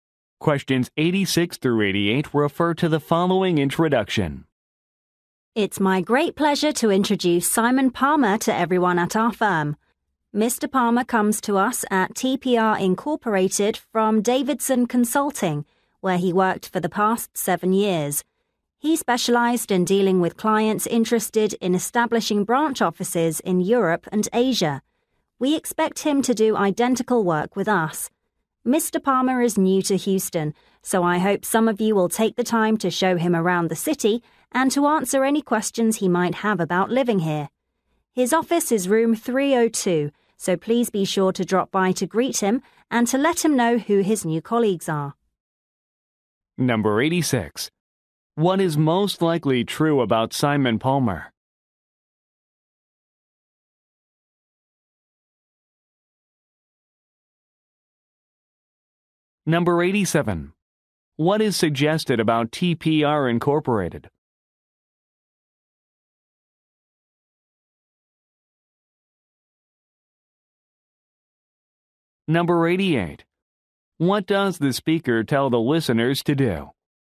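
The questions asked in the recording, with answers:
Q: What is most likely true about Simon Palmer?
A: He worked at Davidson Consulting for 7 years

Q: What does the speaker tell the listeners to do?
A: Drop by his office to greet him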